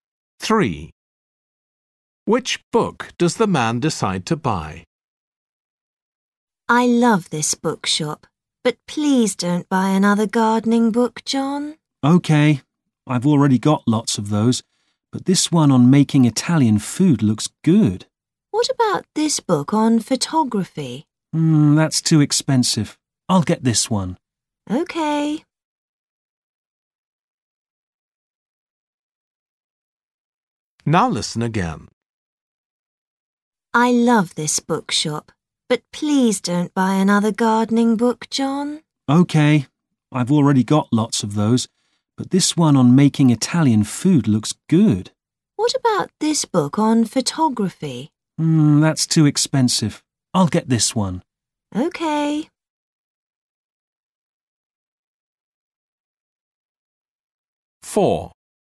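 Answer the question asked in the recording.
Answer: The book on making Italian food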